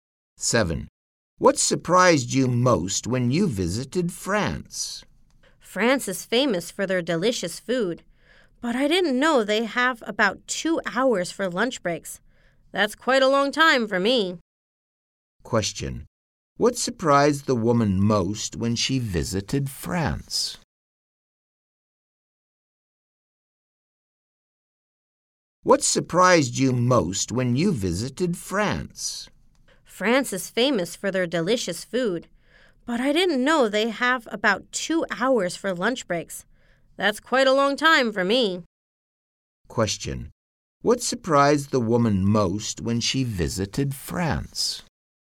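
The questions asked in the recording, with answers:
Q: What surprised the woman most when she visited France?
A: They have about 2-hour lunch breaks.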